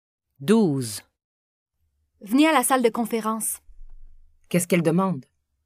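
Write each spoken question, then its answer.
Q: Qu'est-ce qu'elle demande?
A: Elle demande de venir à la salle de conférence.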